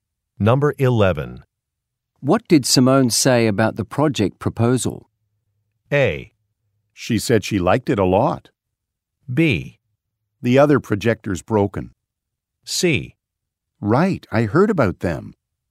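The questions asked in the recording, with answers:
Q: What did Simone say about the project proposal?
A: A: She said she liked it a lot.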